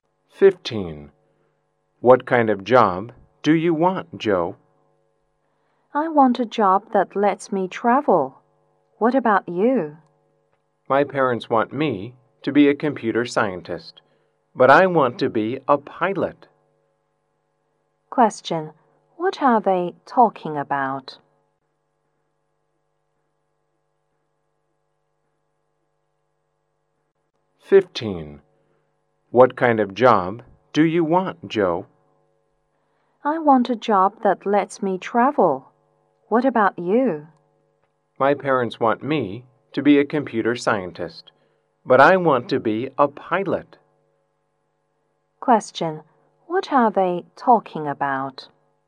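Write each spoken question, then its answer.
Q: What are they talking about?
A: The jobs they want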